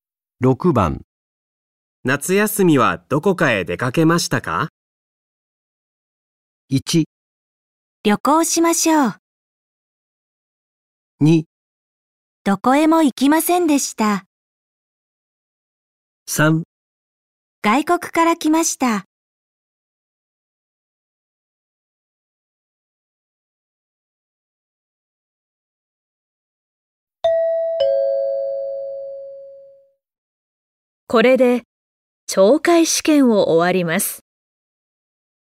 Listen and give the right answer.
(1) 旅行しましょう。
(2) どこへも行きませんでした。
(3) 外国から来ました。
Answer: (2) どこへも行きませんでした。

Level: N5 Listening · Test 1